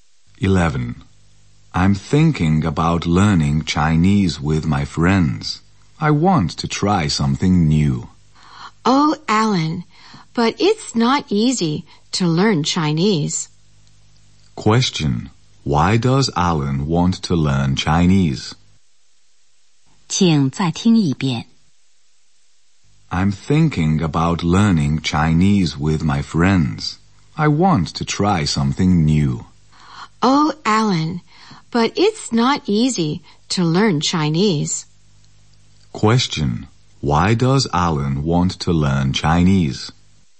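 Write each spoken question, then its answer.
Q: Why does Alan want to learn Chinese?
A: He wants to try something new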